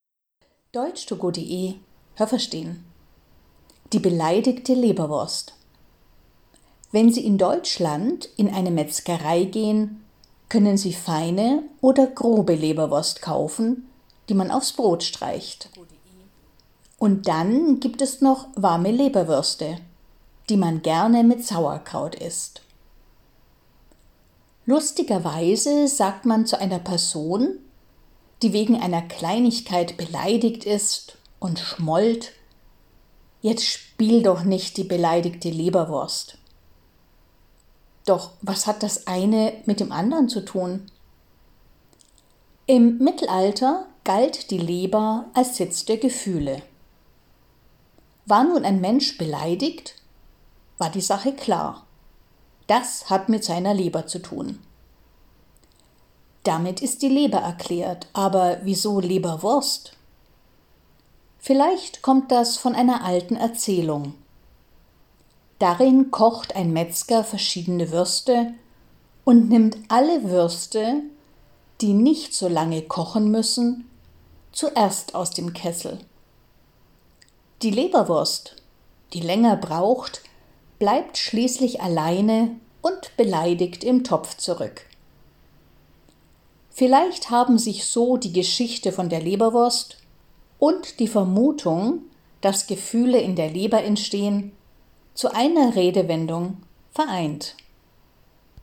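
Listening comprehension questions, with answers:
Haben Sie das gehört? Stimmt diese Aussage?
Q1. Man kann in Deutschland feine und grobe Leberwurst kaufen.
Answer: richtig

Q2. Leberwurst wird immer warm gegessen.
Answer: falsch

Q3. „Jemand spielt die beleidigte Leberwurst", das sagt man zu Menschen, die schnell wütend werden.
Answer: falsch

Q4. Im Mittelalter dachte man, die Gefühle sitzen in der Leber.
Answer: richtig

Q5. Wenn jemand beleidigt war, dann dachte man, das kommt von der Leber.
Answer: richtig

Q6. In einer alten Geschichte wollte ein Metzger keine Leberwürste kochen.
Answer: falsch

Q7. Die Leberwurst war beleidigt, weil sie länger im Topf bleiben musste als die anderen Würste.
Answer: richtig

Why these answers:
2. Es gibt Leberwurst, die man kalt isst – man streicht sie aufs Brot – und Leberwürste, die man warm macht.
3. Das sagt man zu Personen, die wegen Kleinigkeiten schmollen, also schweigen und ein beleidigtes Gesicht machen.
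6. Der Metzger hat eine Leberwurst mit verschiedenen Würsten zusammen gekocht.

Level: B (mittel)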